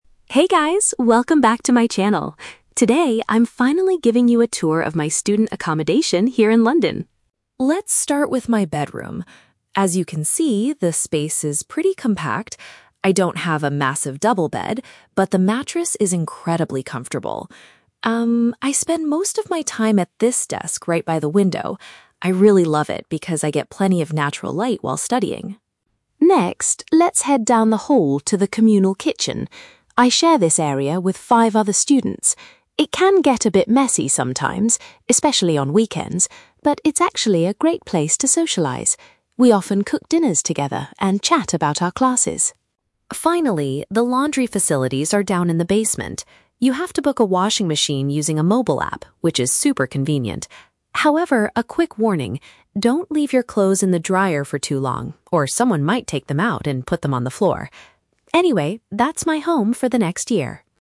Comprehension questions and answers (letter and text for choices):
Listen to a vlog by an international student showing her accommodation. Read the questions below and choose the correct answer (A, B, or C) for each.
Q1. Why does the vlogger like her study desk so much?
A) It is large enough to hold all of her heavy textbooks.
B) It receives a lot of sunshine during the daytime.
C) It is positioned right next to her comfortable bed.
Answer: B) It receives a lot of sunshine during the daytime.

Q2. What is the vlogger's opinion about the communal kitchen?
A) She strongly dislikes it because her flatmates never clean up.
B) She prefers to prepare all of her meals alone to save time.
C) She enjoys it because it provides a chance to interact with others.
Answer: C) She enjoys it because it provides a chance to interact with others.

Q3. What advice does the vlogger give regarding the washing area?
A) Students should remove their items promptly when they are finished.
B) Students must remember to bring cash to pay for the machines.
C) Students need to download a digital map to locate the basement.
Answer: A) Students should remove their items promptly when they are finished.

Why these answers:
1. The Key (Correct): The vlogger says she loves her desk because she gets "plenty of natural light while studying." (Paraphrased: plenty of natural light = a lot of sunshine). The Trap: Option (C) mentions her "comfortable bed", which is in the audio, but it is not the reason she likes her desk. Not mentioned: Option (A) is plausible for a student desk, but the size of the desk or heavy textbooks are never mentioned.
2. The Key (Correct): She states that the kitchen is a "great place to socialize" and they often "cook dinners together and chat." (Paraphrased: socialize / chat = interact with others). The Trap: Option (A) is incorrect. She admits the kitchen can "get a bit messy sometimes" (trap), but she doesn't dislike it; she actually thinks it's a great place. Not mentioned: Option (B) is the opposite of her behavior, as she cooks with her flatmates, not alone.
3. The Key (Correct): The vlogger warns, "don't leave your clothes in the dryer for too long," which means you should take them out (remove them) quickly (promptly). The Trap: Option (C) uses the words "download" and "basement." She mentions the laundry is in the basement and you use a mobile app, but you don't download a map to find it. Not mentioned: Option (B) is a trap because laundry usually costs money, but she pays via a mobile app, not cash.

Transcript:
Vlogger: Hey guys, welcome back to my channel! Today, I'm finally giving you a tour of my student accommodation here in London.
Let's start with my bedroom. As you can see, the space is pretty compact. I don't have a massive double bed, but the mattress is incredibly comfortable. Um, I spend most of my time at this desk right by the window. I really love it because I get plenty of natural light while studying.
Next, let's head down the hall to the communal kitchen. I share this area with five other students. It can get a bit messy sometimes, especially on weekends, but it's actually a great place to socialize. We often cook dinners together and chat about our classes.
Finally, the laundry facilities are down in the basement. You have to book a washing machine using a mobile app, which is super convenient. However, a quick warning: don't leave your clothes in the dryer for too long, or someone might take them out and put them on the floor! Anyway, that's my home for the next year.